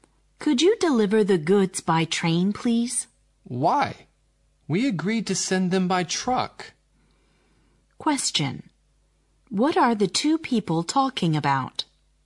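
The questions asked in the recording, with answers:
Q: What are the two people talking about?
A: How to send (deliver) the goods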